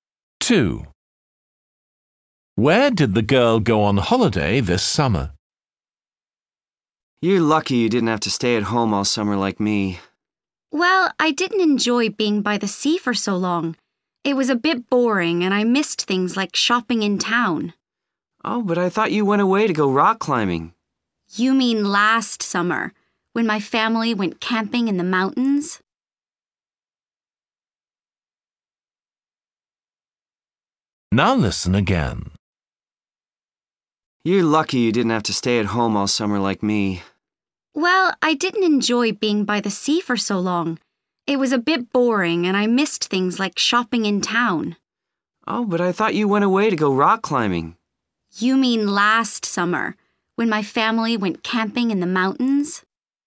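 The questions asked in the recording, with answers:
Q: Where did the girl go on holiday this summer?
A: to the sea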